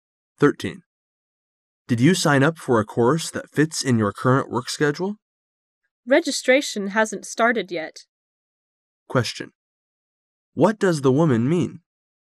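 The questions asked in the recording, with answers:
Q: What does the woman mean?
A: She hasn't signed up yet because registration hasn't started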